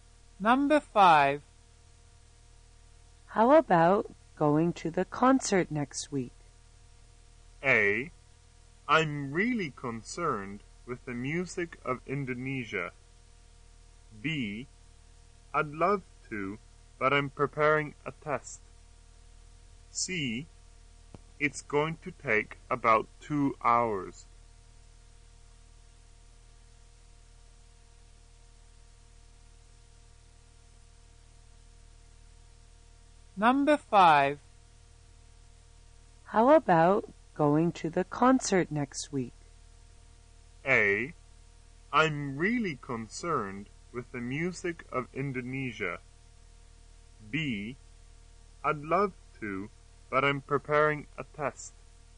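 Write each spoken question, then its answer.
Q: How about going to the concert next week?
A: B: I'd love to, but I'm preparing a test.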